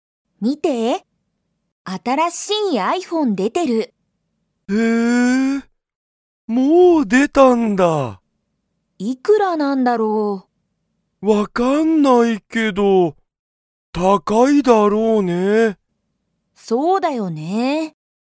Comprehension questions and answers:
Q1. 新あたらしいiPhoneが、もう出でましたか?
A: はい

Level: Level 1